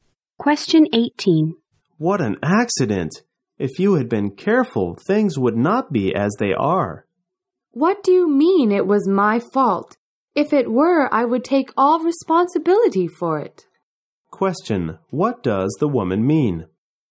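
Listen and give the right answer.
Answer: The accident was not her fault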